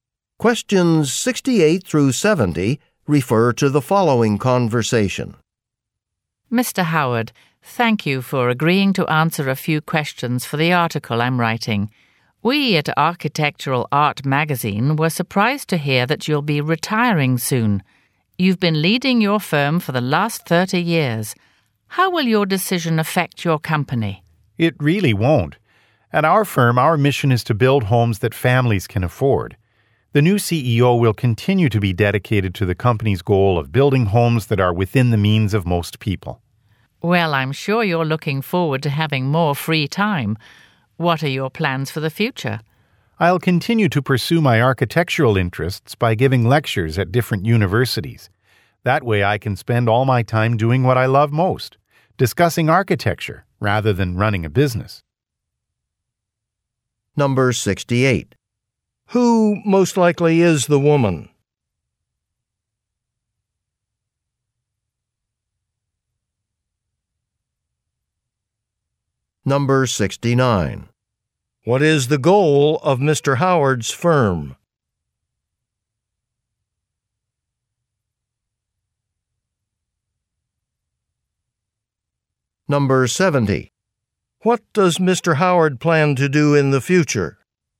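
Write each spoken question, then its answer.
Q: Who most likely is the woman?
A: A magazine writer

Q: What is the goal of Mr. Howard's firm?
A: Building affordable homes

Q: What does Mr. Howard plan to do in the future?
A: Give lectures at universities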